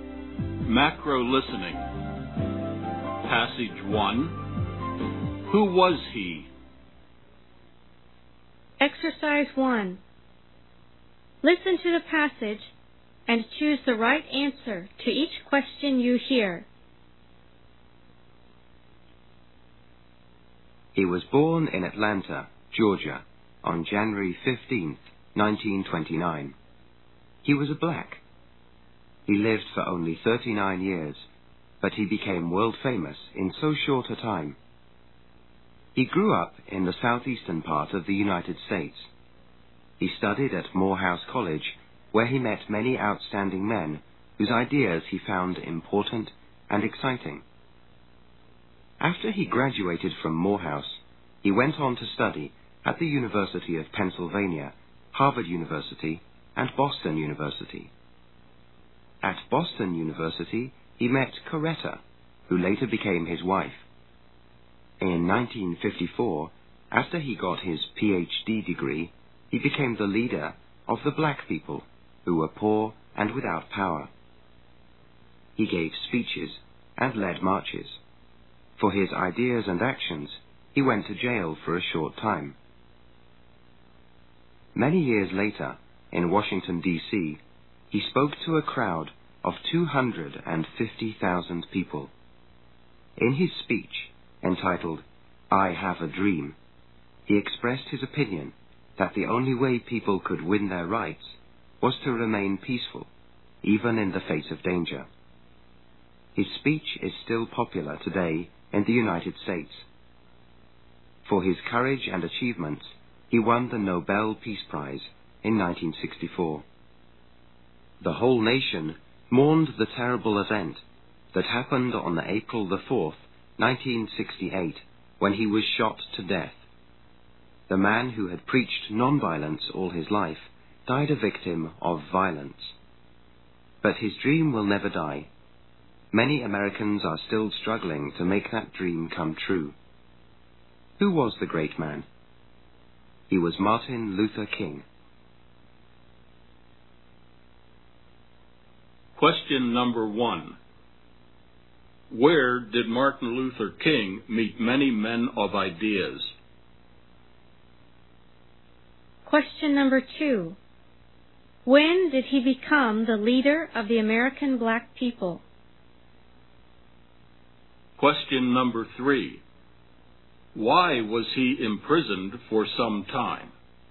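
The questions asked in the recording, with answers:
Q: Where did Martin Luther King meet many men of ideas?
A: At Morehouse College

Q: When did he become the leader of the American black people?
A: In 1954, after he got his Ph.D.

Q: Why was he imprisoned for some time?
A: For his ideas and actions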